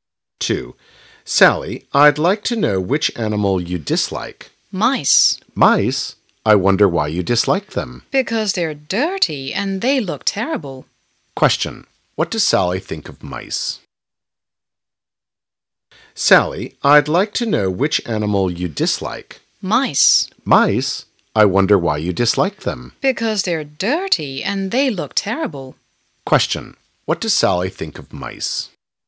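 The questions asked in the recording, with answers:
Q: What does Sally think of mice?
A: They're dirty and look terrible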